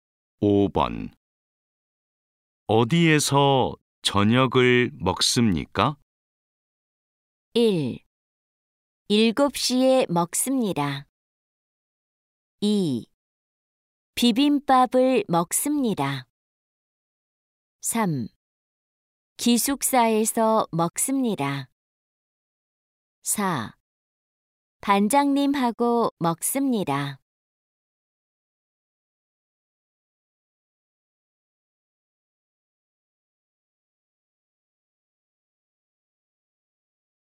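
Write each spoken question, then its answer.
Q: 어디에서 저녁을 먹습니까?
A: 3: 기숙사에서 먹습니다.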